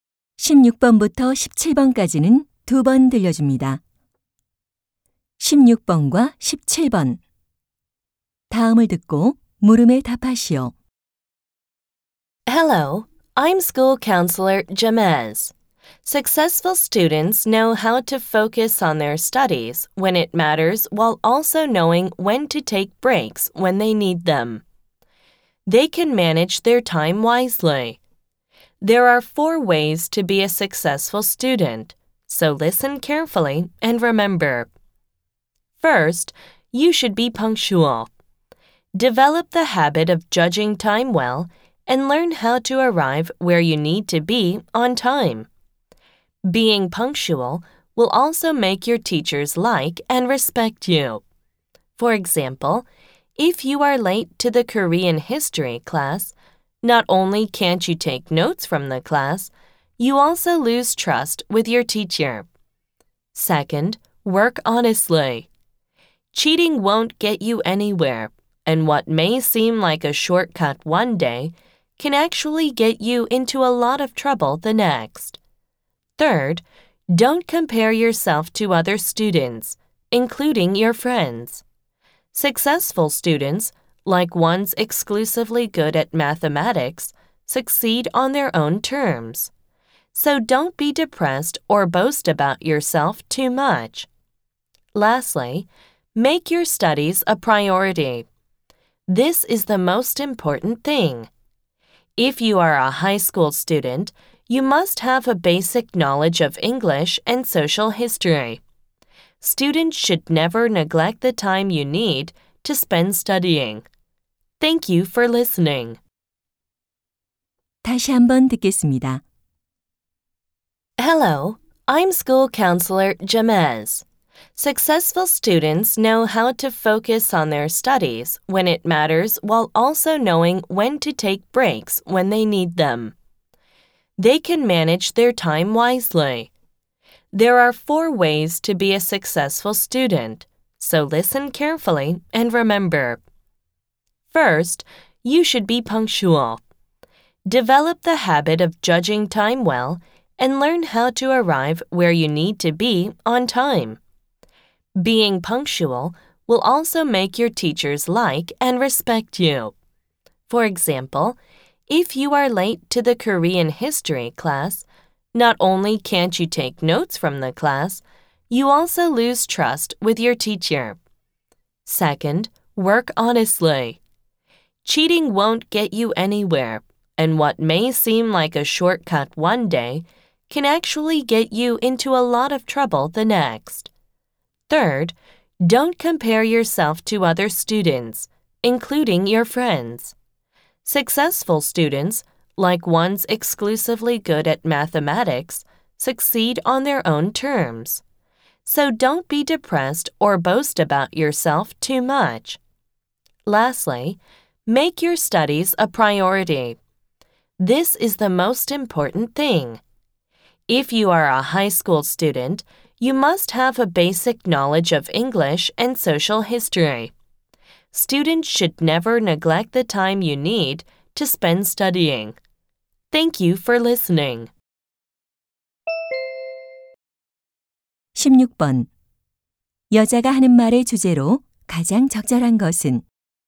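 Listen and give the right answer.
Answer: 성공하는 학생이 되는 방법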